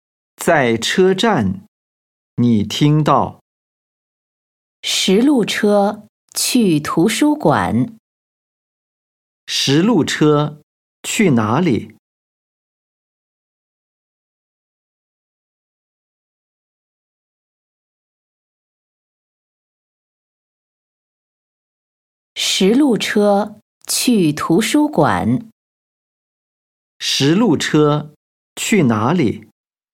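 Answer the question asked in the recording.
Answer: 图书馆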